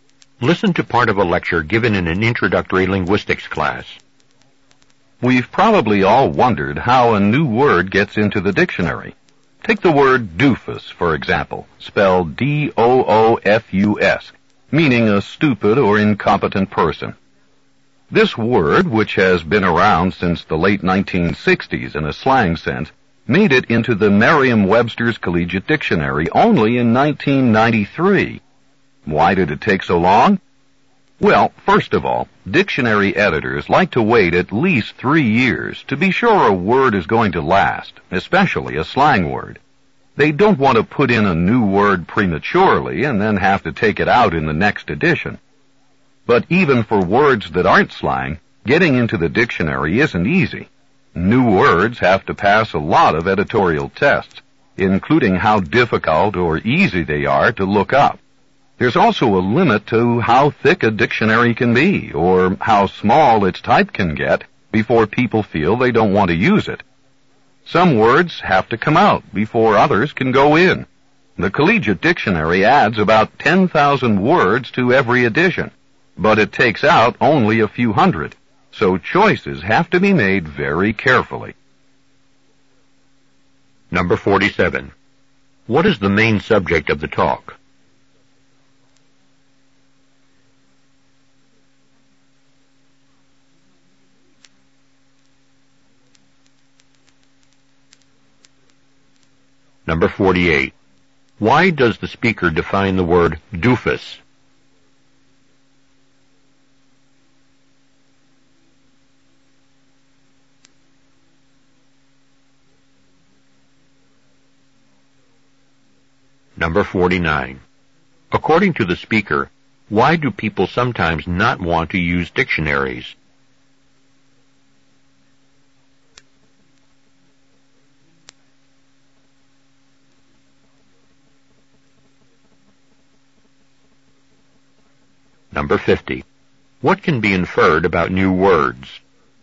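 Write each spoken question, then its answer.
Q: What is the main subject of the talk?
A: How new words get into the dictionary

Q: Why does the speaker define the word doofus?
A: To give an example of a new word that was added to the dictionary

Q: According to the speaker, why do people sometimes not want to use dictionaries?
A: They are too thick or the type is too small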